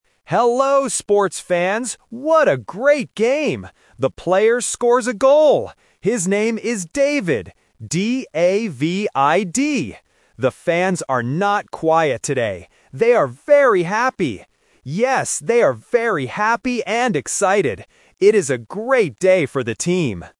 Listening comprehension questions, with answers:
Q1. What is the player's name?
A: David

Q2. How are the fans today?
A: Happy and excited

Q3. What kind of day is it for the team?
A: A great day

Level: A1